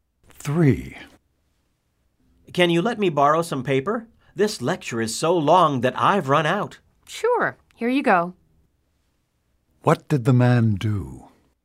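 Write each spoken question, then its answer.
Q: What did the man do?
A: He gave the woman some paper.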